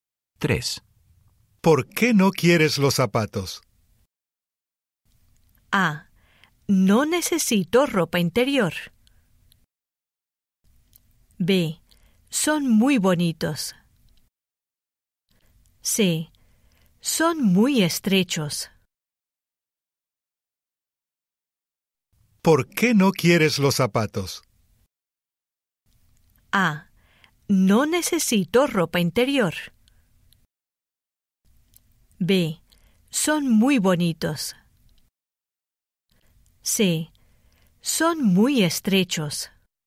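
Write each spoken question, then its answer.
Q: ¿Por qué no quieres los zapatos?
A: C: Son muy estrechos.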